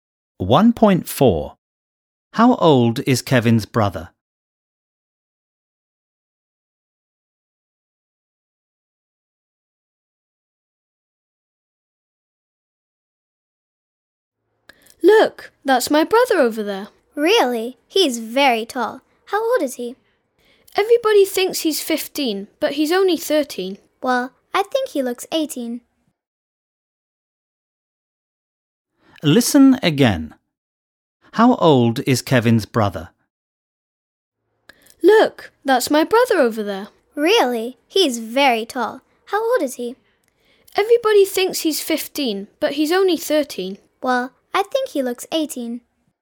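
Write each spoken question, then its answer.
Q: How old is Kevin's brother?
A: 13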